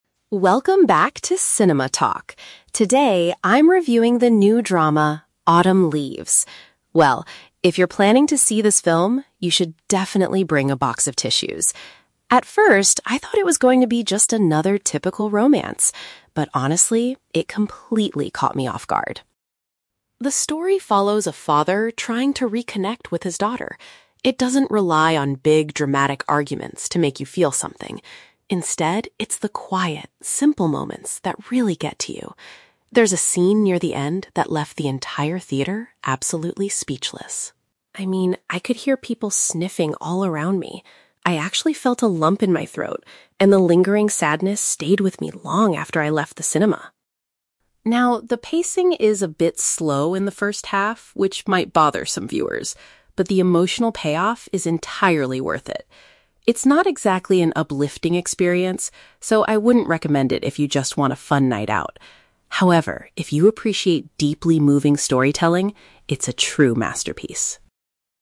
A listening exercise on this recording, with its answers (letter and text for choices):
Read the questions below. Then, listen to the movie critic's review and choose the correct answer (A, B, or C) for each question.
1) What did the critic initially expect the movie to be?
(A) An ordinary love story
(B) A funny and uplifting film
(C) A documentary about a family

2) How did the audience react to the scene near the end of the movie?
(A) They began arguing loudly with each other.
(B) They left the cinema before the movie finished.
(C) They were completely silent and emotional.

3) Who does the critic think should watch this film?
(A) People who are looking for a fun and entertaining evening.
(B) Audiences who enjoy touching and profound stories.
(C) Viewers who like fast-paced movies.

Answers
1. (A) An ordinary love story
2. (C) They were completely silent and emotional.
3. (B) Audiences who enjoy touching and profound stories.

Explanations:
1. The critic says, "At first, I thought it was going to be just another typical romance." Option A paraphrases "typical romance" as "ordinary love story." Option B is incorrect because she explicitly says it is not an uplifting experience. Option C is a trap; the movie is about a family (father and daughter), but it is not a documentary.
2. The critic mentions that the scene left the theater "absolutely speechless" and that she could hear people "sniffing" (crying). This matches Option (C) Option A is a trap because she mentions "dramatic arguments" as something the film does not rely on. Option B is a trap because she talks about her own feelings after she "left the cinema," not that the audience walked out early.
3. At the end, the critic says, "...if you appreciate deeply moving storytelling, it's a true masterpiece." Option B paraphrases this perfectly. Option A is the exact opposite of her advice (she says she wouldn't recommend it for a fun night out). Option C is wrong because she specifically states the pacing is "a bit slow," not fast-paced.

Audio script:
Movie Critic: Welcome back to 'Cinema Talk'. Today, I'm reviewing the new drama, Autumn Leaves. Well... if you're planning to see this film, you should definitely bring a box of tissues. At first, I thought it was going to be just another typical romance. But, honestly, it completely caught me off guard.
The story follows a father trying to reconnect with his daughter. It doesn't rely on big, dramatic arguments to make you feel something. Instead, it's the quiet, simple moments that really get to you. There's a scene near the end that left the entire theater absolutely speechless. I mean, I could hear people sniffing all around me. I actually felt a lump in my throat, and the lingering sadness stayed with me long after I left the cinema.
Now, the pacing is a bit slow in the first half, which might bother some viewers, but the emotional payoff is entirely worth it. It's not exactly an uplifting experience, so I wouldn't recommend it if you just want a fun night out. However, if you appreciate deeply moving storytelling, it's a true masterpiece.